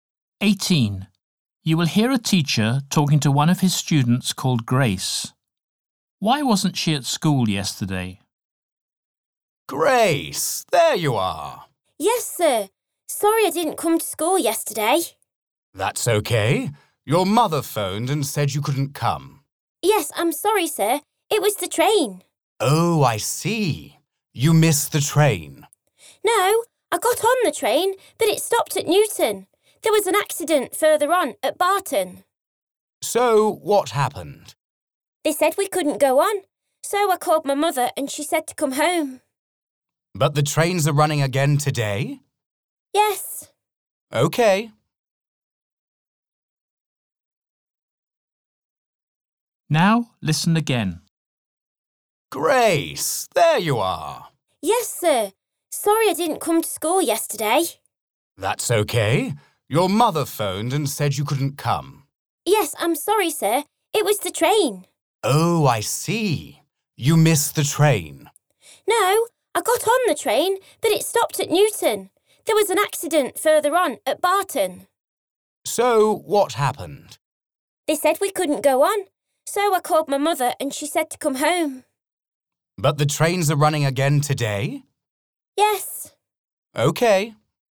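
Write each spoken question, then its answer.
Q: Why wasn't she at school yesterday?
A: her train stopped because of an accident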